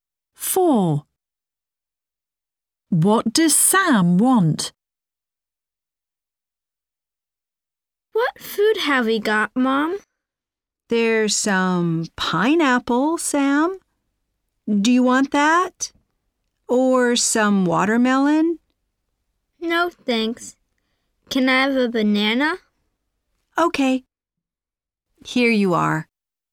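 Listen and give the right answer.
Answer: A banana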